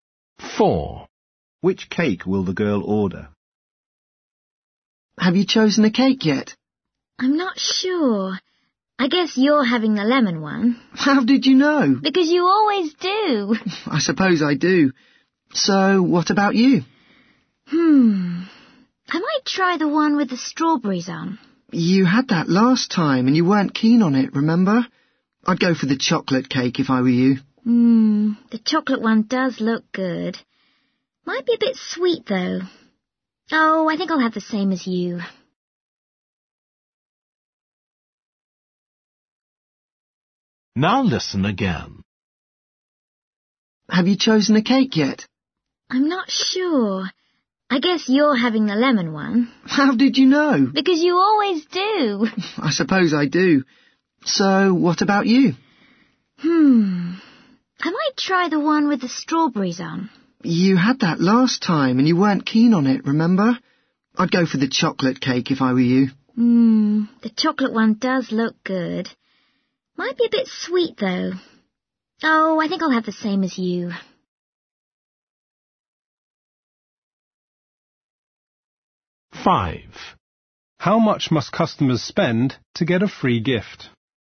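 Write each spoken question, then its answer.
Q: Which cake will the girl order?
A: the lemon cake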